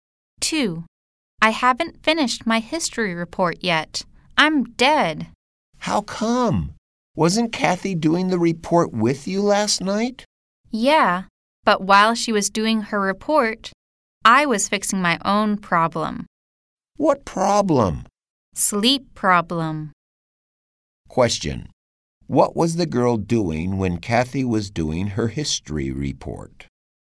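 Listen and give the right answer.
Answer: She was sleeping.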